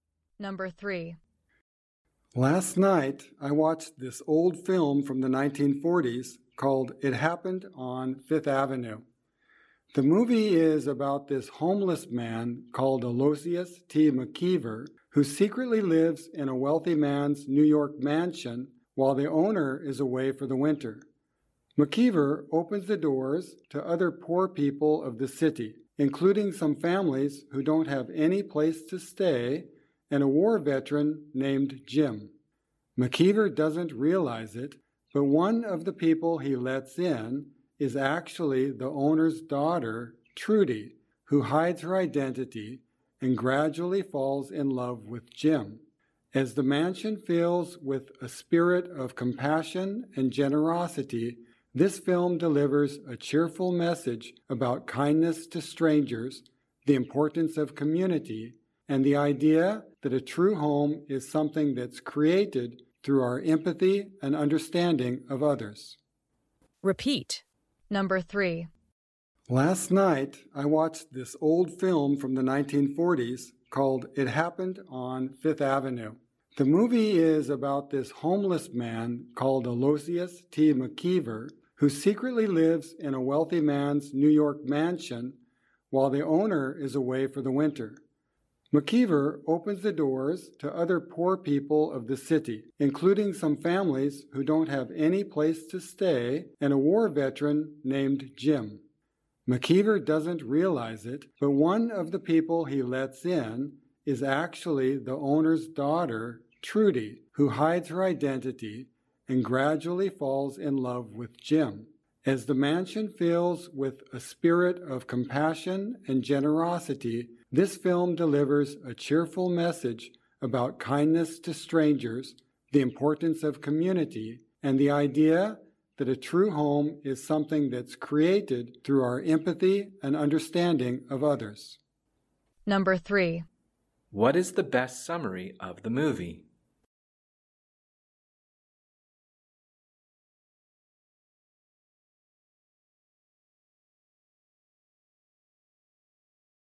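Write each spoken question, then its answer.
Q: What is the best summary of the movie?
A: A homeless man secretly living in a rich man's mansion opens it to other poor people, and the film sends a cheerful message about kindness, community and that a true home is made through empathy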